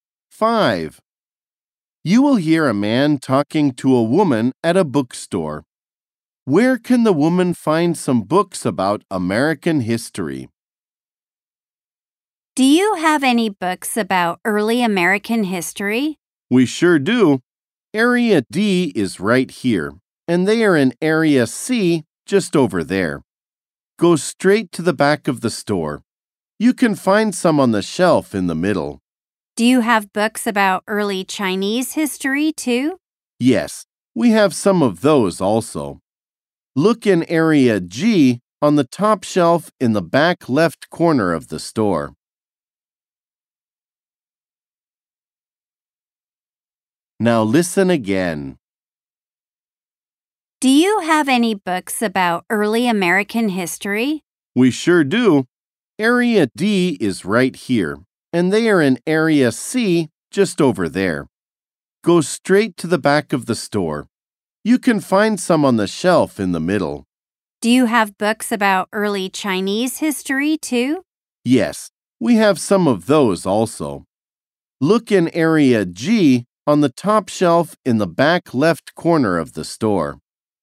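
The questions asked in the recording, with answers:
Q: Where can the woman find some books about American history?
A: In Area C, on the shelf in the middle at the back of the store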